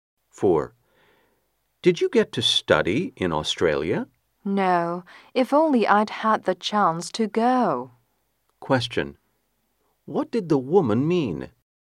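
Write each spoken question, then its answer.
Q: What did the woman mean?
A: She didn't get to study in Australia but wishes she had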